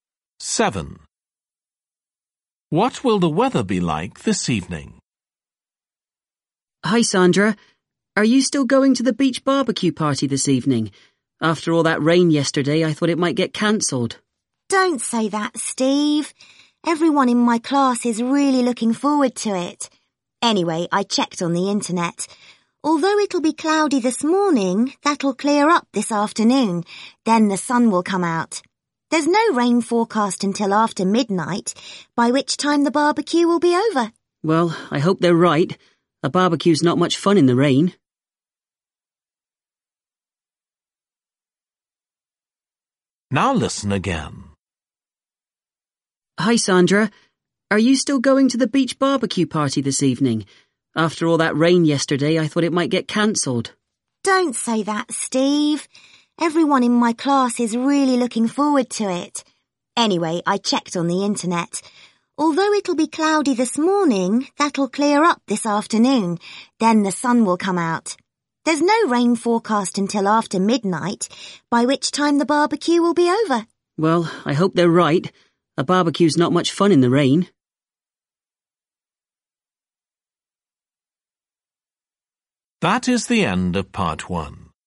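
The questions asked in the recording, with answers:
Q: What will the weather be like this evening?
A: Sunny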